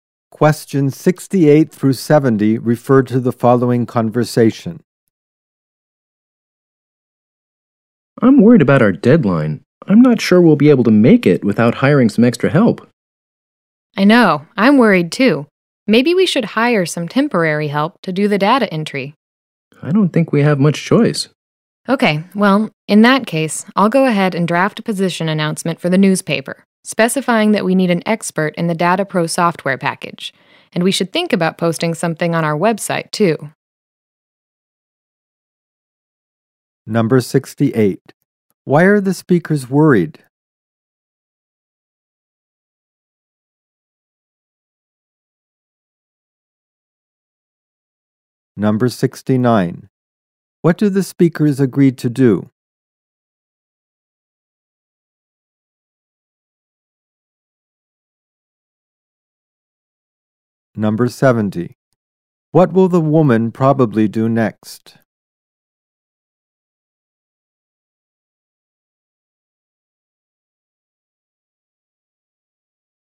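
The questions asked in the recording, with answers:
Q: Why are the speakers worried?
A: They may not make their deadline

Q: What do the speakers agree to do?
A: Hire temporary help for data entry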